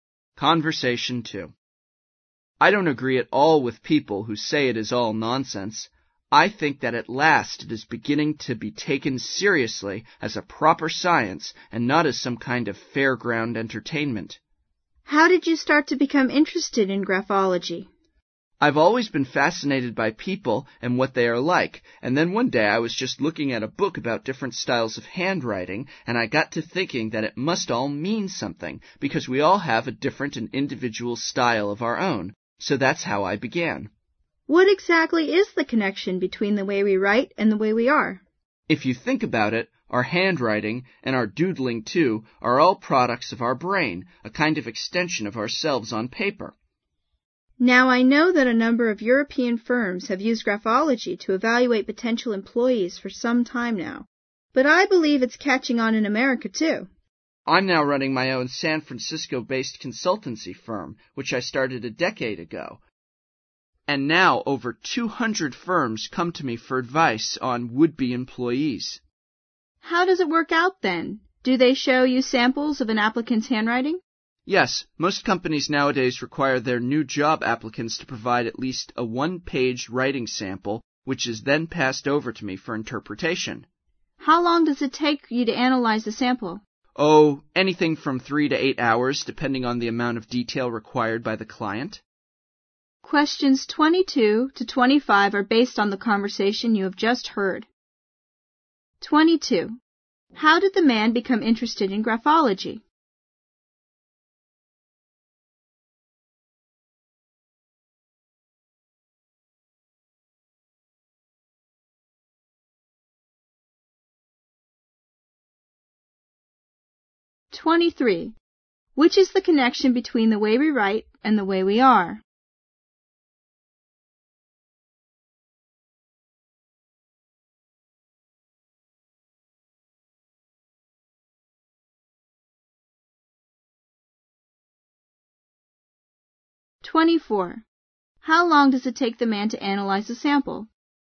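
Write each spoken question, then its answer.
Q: How did the man become interested in graphology?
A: He was fascinated by people and read a book about handwriting styles

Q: Which is the connection between the way we write and the way we are?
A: Handwriting is a product of our brain, an extension of ourselves on paper

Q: How long does it take the man to analyze a sample?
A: From 3 to 8 hours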